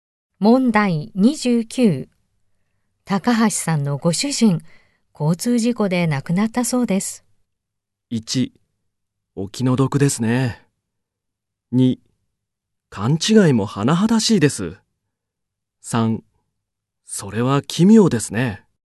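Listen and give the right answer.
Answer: 1: お気の毒ですね。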